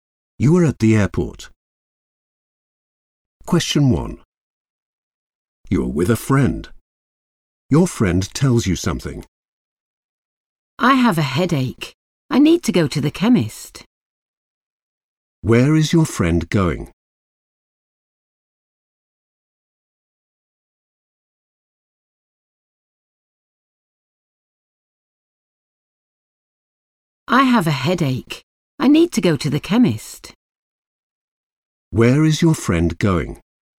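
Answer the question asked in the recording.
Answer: to the chemist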